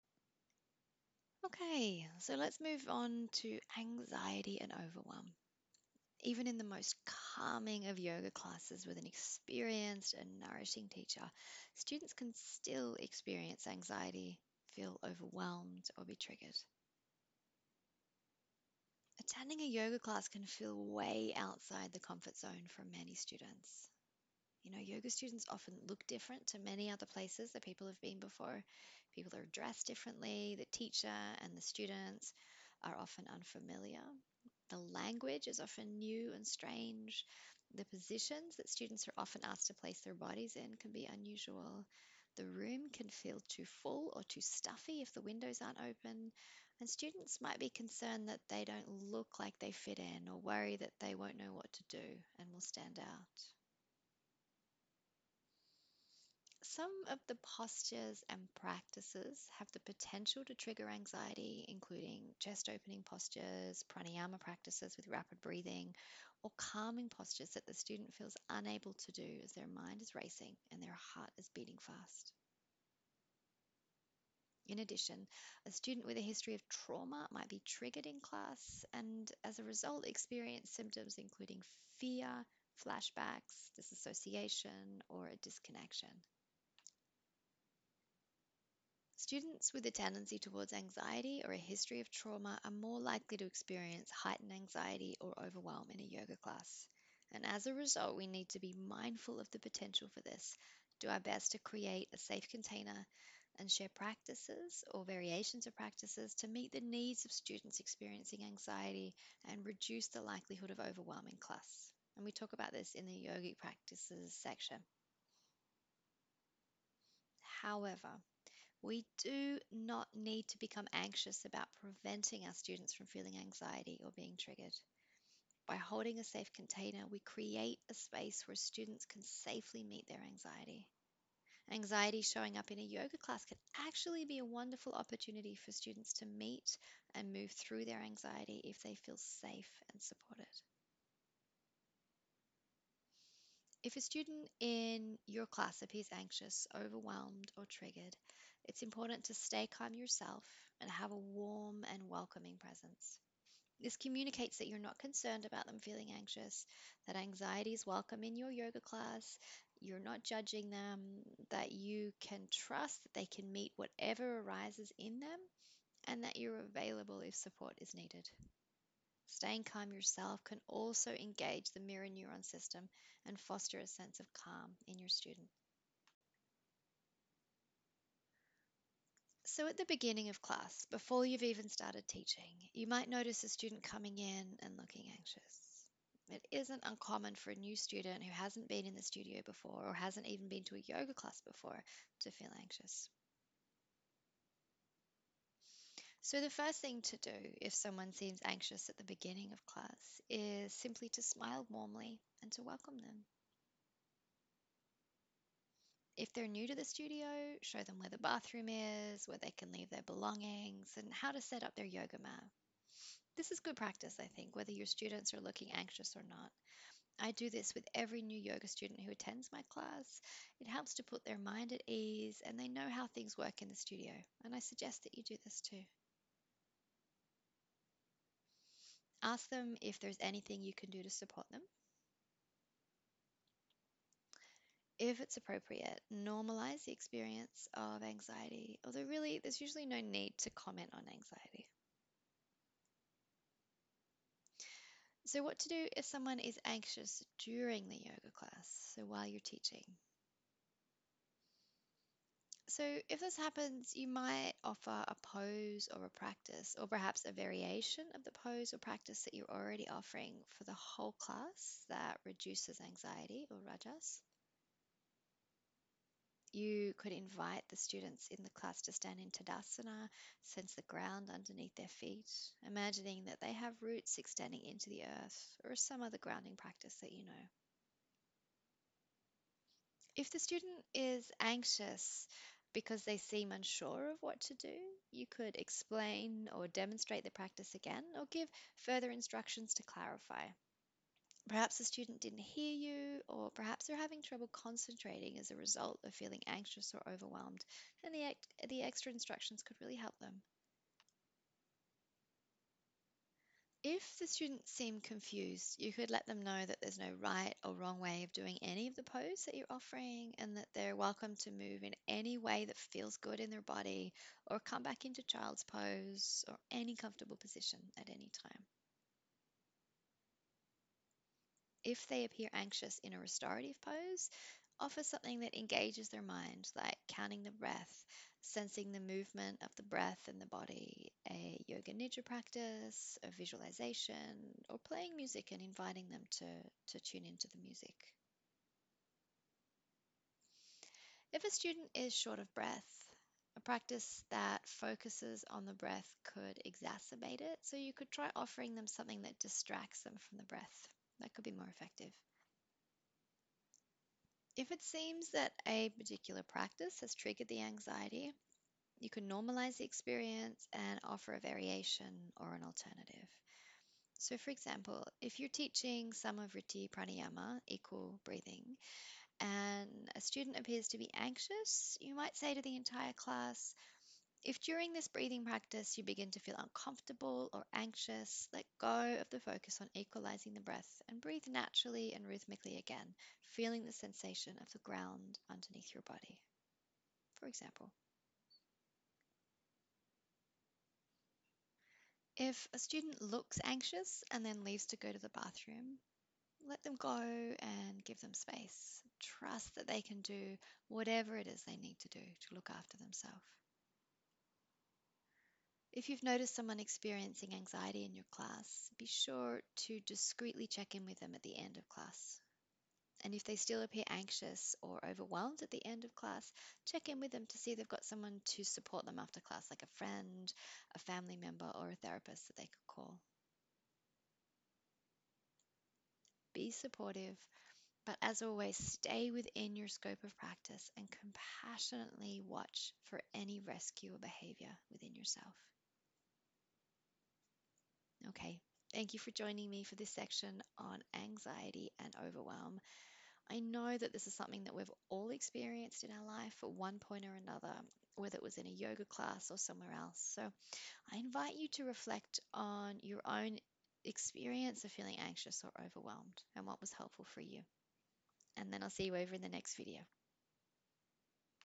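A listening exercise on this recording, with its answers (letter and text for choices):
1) Why might a student feel anxious or overwhelmed in a yoga class?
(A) Attending a yoga class might be a new experience for the student, and they might feel outside their comfort zone.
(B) A yoga posture or practice could trigger anxiety.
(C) A student could have a history of trauma that is triggered in the yoga class.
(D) All of the above.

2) What could you do if a student appears anxious at the beginning of class?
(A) Stay calm yourself and have a warm and welcoming presence.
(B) Let them know where the bathroom is, where they can leave their belongings and how they can set up their yoga mat.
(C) Ask if there's anything you can do to support them.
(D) All of the above.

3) What could you do if a student appears anxious during class?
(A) Offer a pose or a practice for the whole class that reduces anxiety.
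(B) Explain or demonstrate the practice again, or give further instruction to clarify.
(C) If they leave to go to the bathroom, let them go and give them space, without calling attention to them or insisting that they stay in the class.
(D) All of the above.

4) If as student becomes anxious or overwhelmed in class, it's important for you to:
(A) Stay after class with the student for as long as they need, debriefing about the class, talking about the root causes of their anxiety and giving them a diagnosis.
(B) Stay within your scope of practice and compassionately watch for any rescuer behaviour in yourself.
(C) Call a therapist who specialises in treating anxiety for your student, and offer to go to their first appointment with them.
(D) All of the above.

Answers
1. (D) All of the above.
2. (D) All of the above.
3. (D) All of the above.
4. (B) Stay within your scope of practice and compassionately watch for any rescuer behaviour in yourself.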